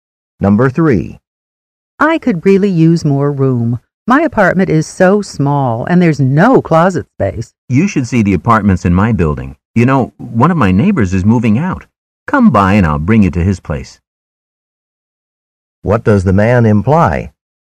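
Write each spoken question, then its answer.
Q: What does the man imply?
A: The woman could rent his neighbor's apartment, which is becoming available.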